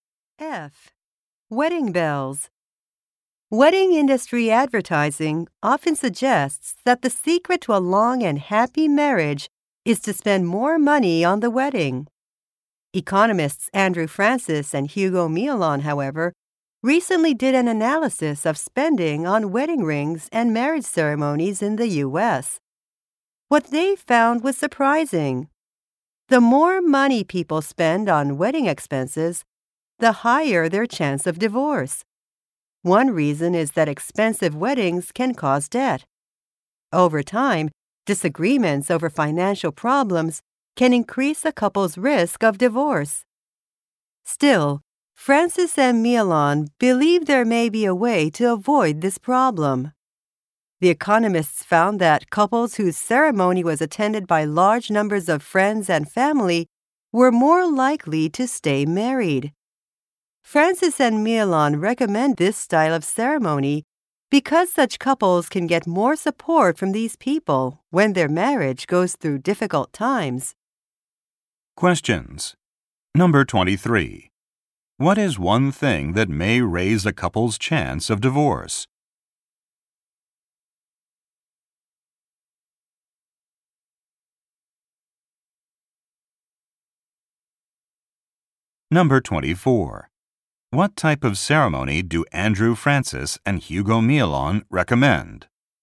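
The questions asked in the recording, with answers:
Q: What is one thing that may raise a couple's chance of divorce?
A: Spending a lot of money on the wedding.

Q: What type of ceremony do Andrew Francis and Hugo Miolon recommend?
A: One attended by many friends and family.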